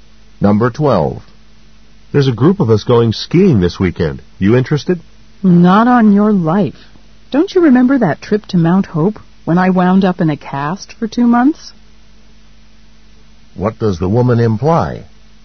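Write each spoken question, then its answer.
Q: What does the woman imply?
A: She won't go skiing because she got hurt on her last ski trip.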